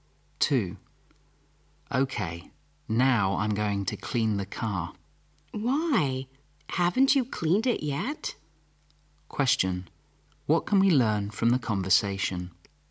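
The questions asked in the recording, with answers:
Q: What can we learn from the conversation?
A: The car hasn't been cleaned yet.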